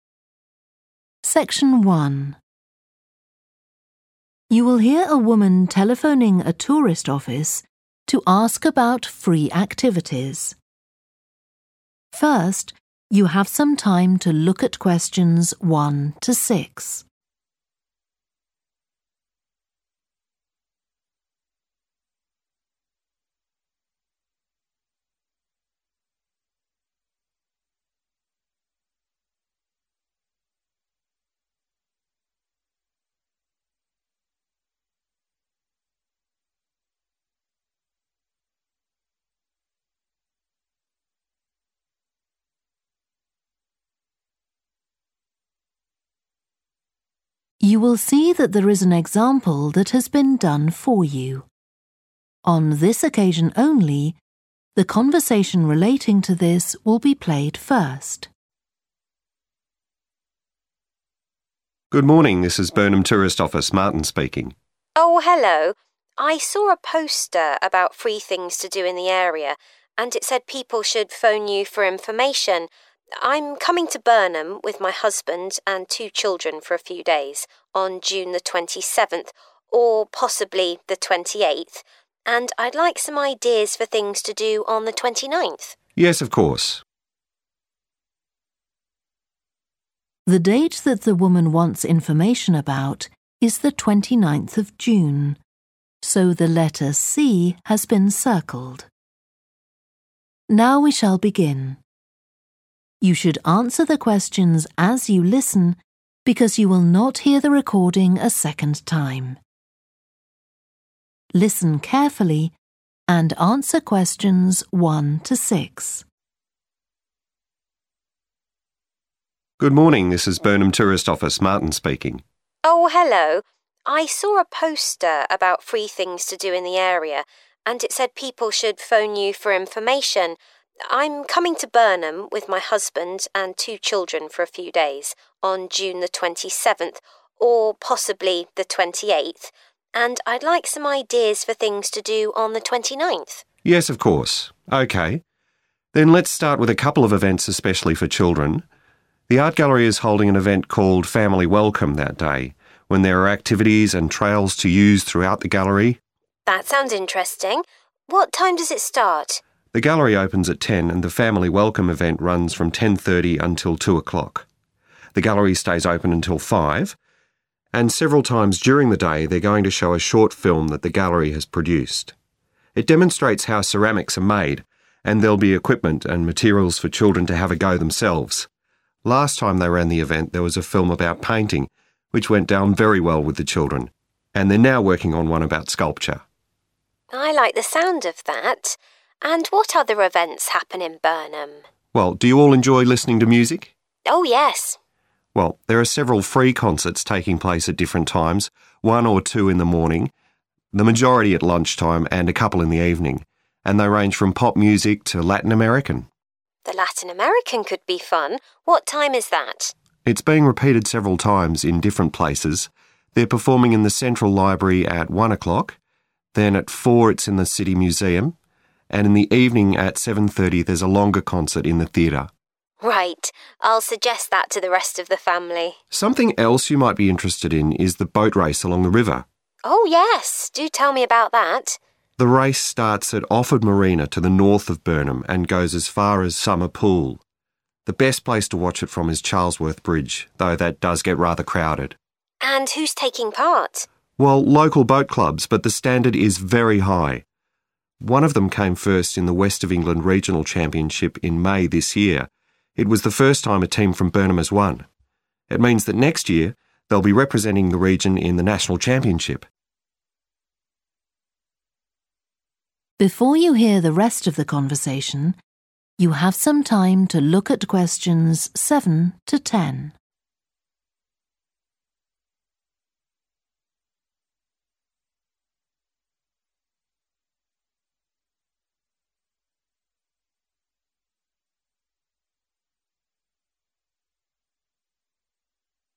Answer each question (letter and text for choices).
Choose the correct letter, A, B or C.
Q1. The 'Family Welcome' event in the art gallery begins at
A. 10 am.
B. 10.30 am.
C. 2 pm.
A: B. 10.30 am.

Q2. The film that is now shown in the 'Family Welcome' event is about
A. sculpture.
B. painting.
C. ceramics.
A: C. ceramics.

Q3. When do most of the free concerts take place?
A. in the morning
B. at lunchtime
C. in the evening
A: B. at lunchtime

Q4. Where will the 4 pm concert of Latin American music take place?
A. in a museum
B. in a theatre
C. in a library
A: A. in a museum

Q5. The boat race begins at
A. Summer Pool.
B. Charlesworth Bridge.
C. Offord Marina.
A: C. Offord Marina.

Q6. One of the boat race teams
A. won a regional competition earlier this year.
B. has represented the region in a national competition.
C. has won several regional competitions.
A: A. won a regional competition earlier this year.

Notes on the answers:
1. The correct answer is B because the transcript states that the 'Family Welcome' event starts at 10:30 am.
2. The correct answer is 'Ceramics' (C) because the film shown at the event is specifically about how ceramics are made. This information is explicitly mentioned in the excerpt where it states that a short film will demonstrate the process of creating ceramics.
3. The correct answer is 'B' because the excerpt clearly states that the majority of the free concerts take place around lunchtime, confirming that the answer 'B - at lunchtime' is accurate.
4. The correct answer is 'A' because the excerpt specifically mentions that the 4 pm concert of Latin American music will be held in the City Museum. Therefore, the museum is the location for this event.
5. The correct answer is 'C' because the excerpt clearly states that the boat race starts at Offord Marina, which matches the answer choice C in the list provided.
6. The correct answer is A because the excerpt specifically mentions that a team came first in a regional championship, aligning with the answer choice that mentions winning a regional competition earlier in the year.

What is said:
MARTIN: Good morning. This is Burnham tourist, Martin speaking.
SUE: Oh, hello. I saw a poster about free things to do in the area, and it said people should phone you for information. I'm coming to Burnham with my husband and two children for a few days on June the 27th, or possibly the 28th, and I'd like some ideas for things to do on the 29th.
MARTIN: Yes, of course. OK. Then let's start with a couple of events especially for children. The art gallery is holding an event called 'Family Welcome' that day, when there are activities and trails to use throughout the gallery.
SUE: That sounds interesting. What time does it start?
MARTIN: The gallery opens at 10, and the 'Family Welcome' event runs from 10.30 until 2 o'clock. The gallery stays open until 5. And several times during the day, they're going to show a short film that the gallery has produced. It demonstrates how ceramics are made, and there'll be equipment and materials for children to have a go themselves. Last time they ran the event, there was a film about painting, which went down very well with the children, and they're now working on one about sculpture.
SUE: I like the sound of that. And what other events happen in Burnham?
MARTIN: Well, do you all enjoy listening to music?
SUE: Oh, yes.
MARTIN: Well there are several free concerts taking place at different times – one or two in the morning, the majority at lunchtime, and a couple in the evening. And they range from pop music to Latin American.
SUE: The Latin American could be fun. What time is that?
MARTIN: It's being repeated several times, in different places. They're performing in the central library at 1 o'clock, then at 4 it's in the City Museum, and in the evening, at 7.30, there's a longer concert, in the theatre.
SUE: Right. I'll suggest that to the rest of the family.
MARTIN: Something else you might be interested in is the boat race along the river.
SUE: Oh, yes, do tell me about that.
MARTIN: The race starts at Offord Marina, to the north of Burnham, and goes as far as Summer Pool. The best place to watch it from is Charlesworth Bridge, though that does get rather crowded.
SUE: And who's taking part?
MARTIN: Well, local boat clubs, but the standard is very high. One of them came first in the West of England regional championship in May this year – it was the first time a team from Burnham has won. It means that next year they'll be representing the region in the national championship.